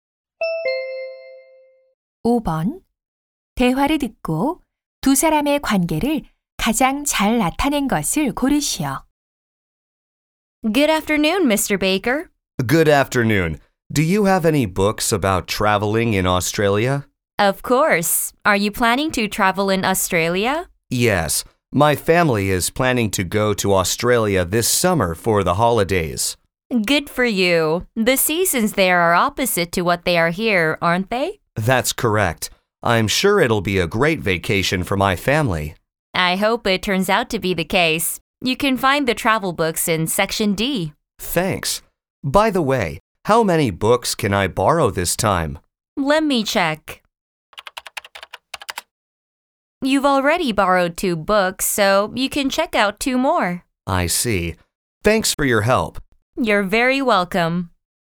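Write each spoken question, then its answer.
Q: 대화를 듣고 두 사람의 관계를 가장 잘 나타낸 것을 고르시오.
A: 도서관 사서 - 도서관 이용자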